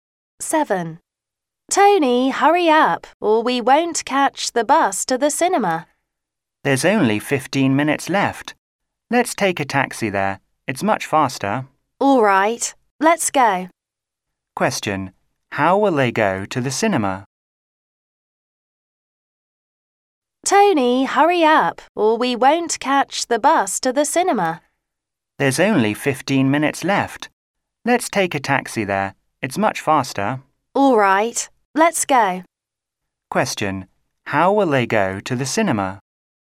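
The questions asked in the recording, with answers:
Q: Question: How will they go to the cinema?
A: By taxi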